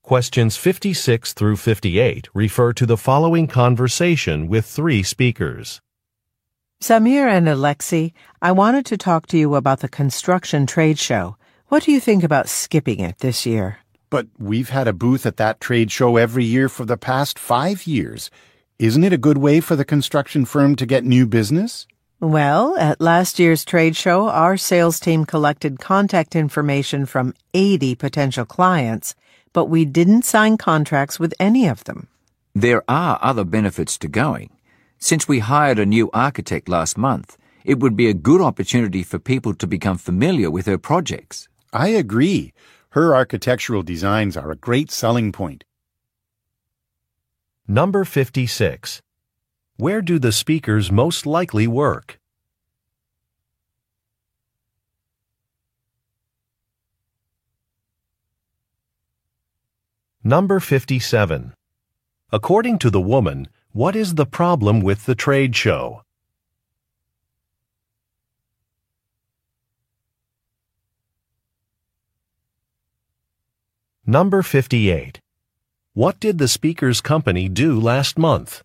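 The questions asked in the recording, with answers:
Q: Where do the speakers most likely work?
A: At a construction firm

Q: According to the woman, what is the problem with the trade show?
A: It did not lead to any new contracts

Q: What did the speaker's company do last month?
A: Hired a new architect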